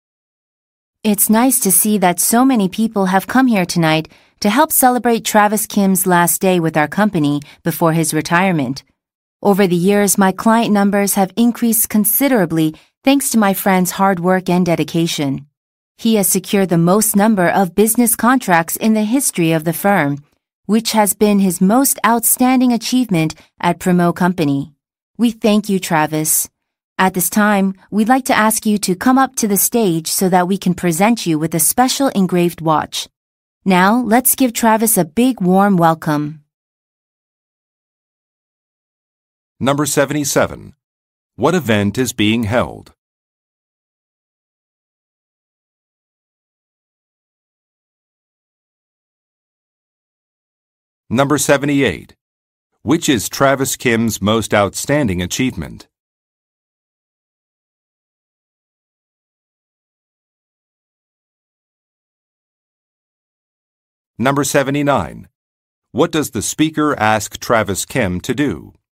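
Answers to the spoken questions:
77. A retirement party for Travis Kim
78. Securing the most business contracts in the firm's history
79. Come up to the stage to receive an engraved watch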